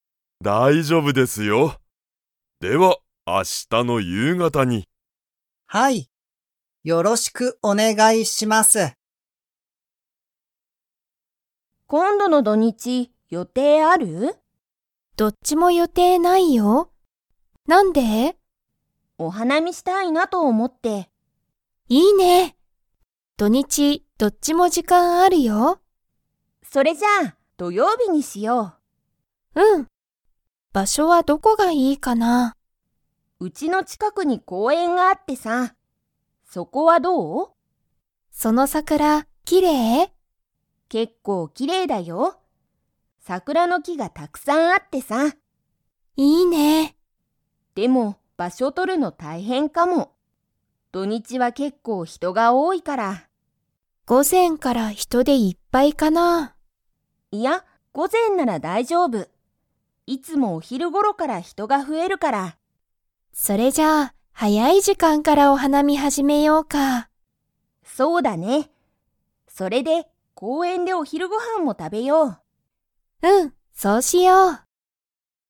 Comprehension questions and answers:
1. 二人ふたりは、いつお花見はなみをしますか?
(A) 木曜日もくようび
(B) 金曜日きんようび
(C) 土曜日どようび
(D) 日曜日にちようび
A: (C) 土曜日どようび

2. 二人ふたりは、早はやい時間じかんからお花見はなみを 。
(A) 始はじめる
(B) 始はじめない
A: (A) 始はじめる

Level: Level 4

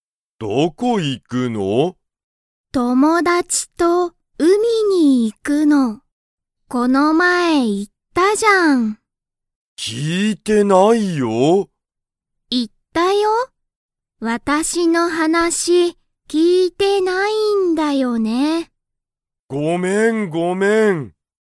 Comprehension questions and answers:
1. サオリは____に行(い)く。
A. 学校(がっこう)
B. 会社(かいしゃ)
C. レストラン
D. 海(うみ)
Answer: D. 海(うみ)

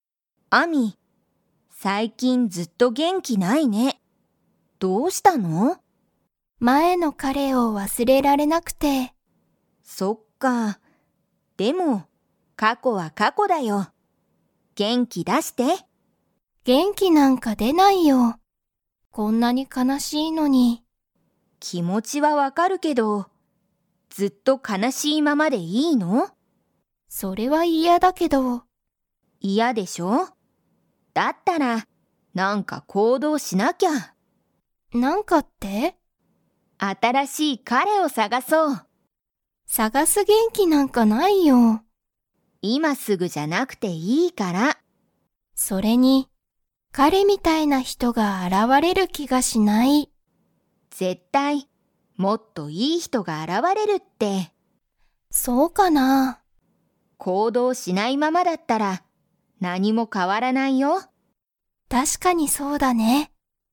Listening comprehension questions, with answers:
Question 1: アミは を忘わすれられなくて、元気げんきがない。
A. 前まえの彼かれ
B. 今いまの彼かれ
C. 前まえの友達ともだち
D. 今いまの友達ともだち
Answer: A. 前まえの彼かれ

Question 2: カオリは、アミにもっといい人ひとが現あらわれると思おもっていますか?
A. はい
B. いいえ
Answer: A. はい

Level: Level 3

